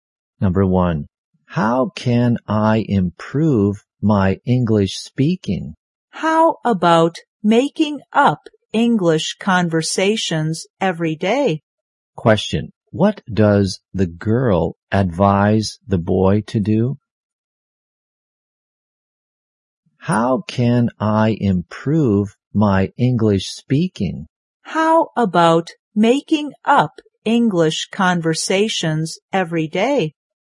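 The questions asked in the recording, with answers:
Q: what does the girl advise the boy to do?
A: Make up English conversations every day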